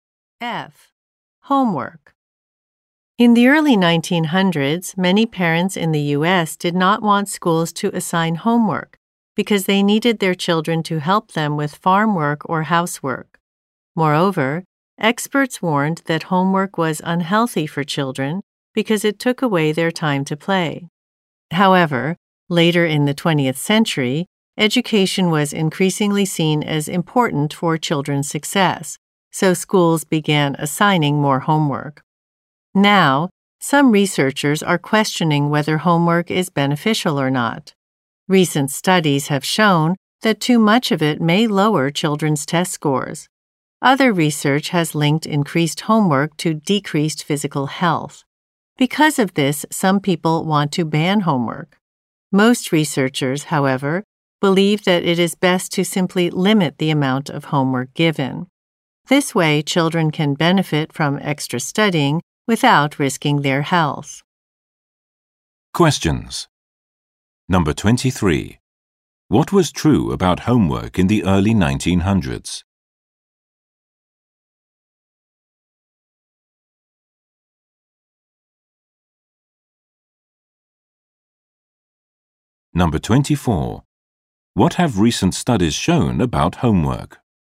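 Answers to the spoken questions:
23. Many parents didn't want it because they needed their children for farm work or housework.
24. Too much homework may lower children's test scores.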